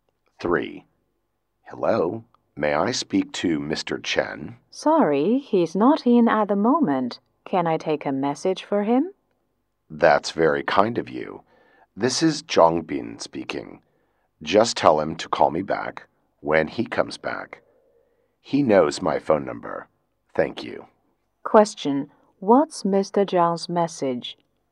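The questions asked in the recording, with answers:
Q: What's Mr. Zhang's message?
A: Mr. Chen should call him back when he comes back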